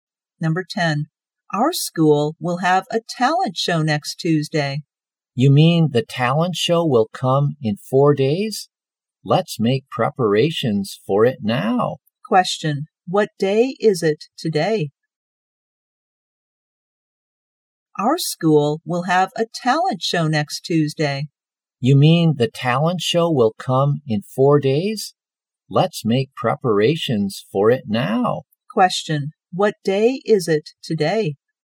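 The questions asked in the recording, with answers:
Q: Question. What day is it today?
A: Friday.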